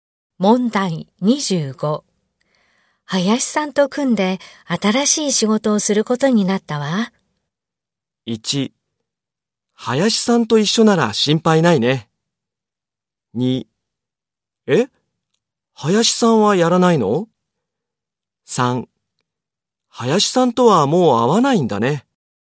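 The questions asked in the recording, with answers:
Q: 林さんと組んで新しい仕事をすることになったわ。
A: 1: 林さんと一緒なら心配ないね。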